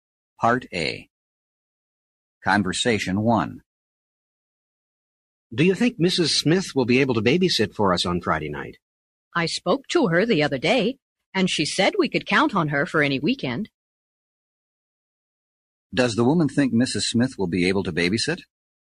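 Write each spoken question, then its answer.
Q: Does the woman think Mrs. Smith will be able to babysit?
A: Yes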